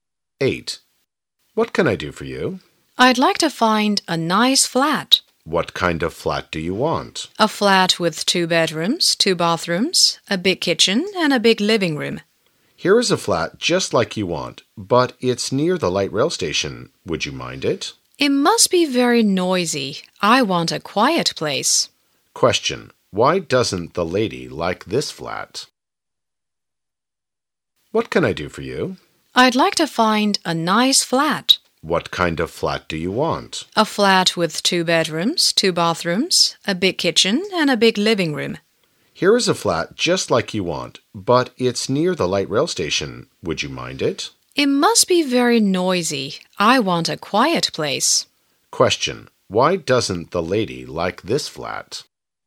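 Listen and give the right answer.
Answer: It is near the light rail station, so it must be noisy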